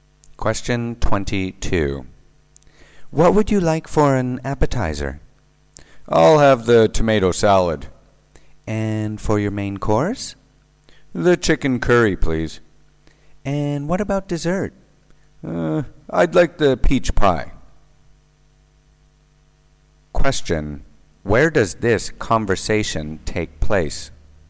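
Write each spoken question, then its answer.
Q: Where does this conversation take place?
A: In a restaurant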